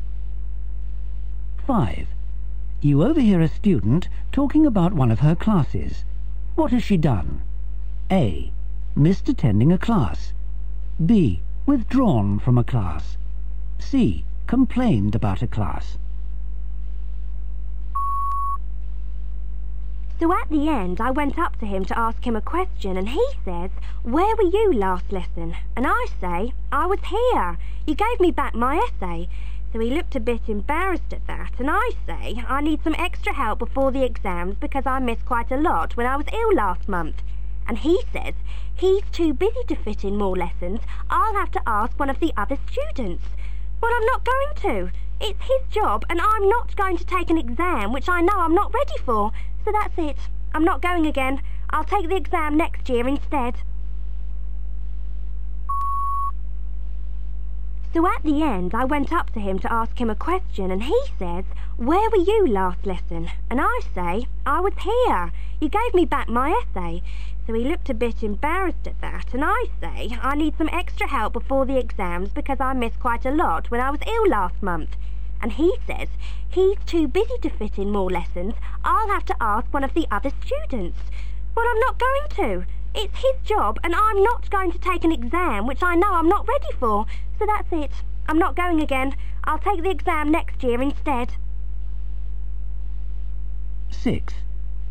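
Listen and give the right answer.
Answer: B: Withdrawn from a class.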